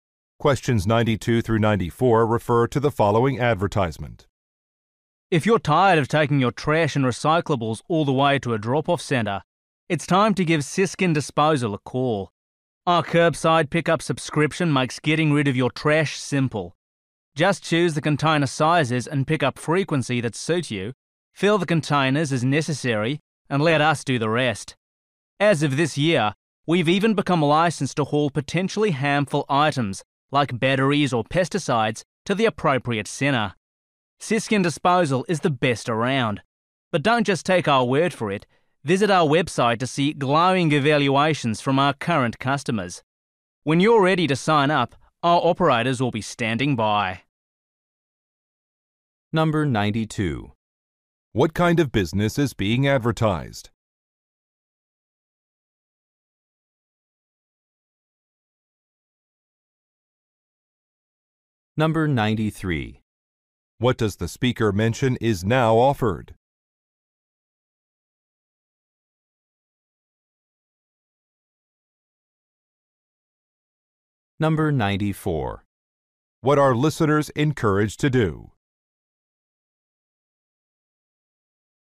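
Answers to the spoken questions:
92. A trash and recycling pickup service
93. Hauling of hazardous items
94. Read customer reviews on the website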